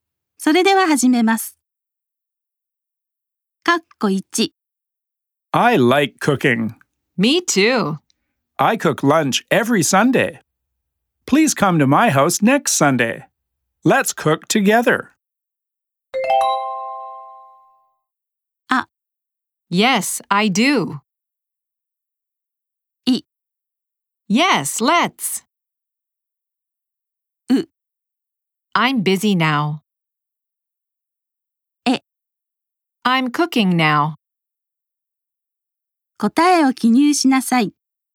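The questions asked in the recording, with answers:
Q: Let's cook together.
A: い: Yes, let's.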